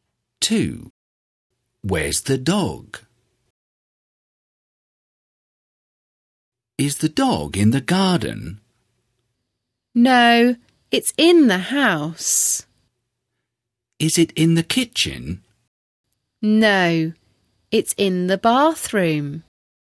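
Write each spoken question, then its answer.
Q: Where's the dog?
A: In the bathroom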